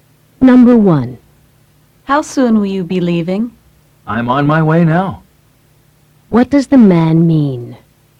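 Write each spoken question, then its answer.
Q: What does the man mean?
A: He is leaving right now.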